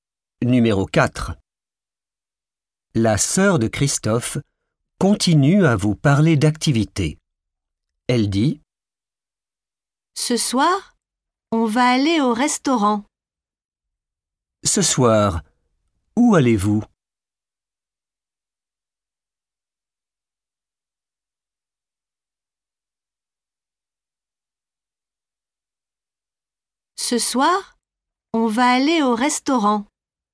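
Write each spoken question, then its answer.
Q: Ce soir, où allez-vous?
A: au restaurant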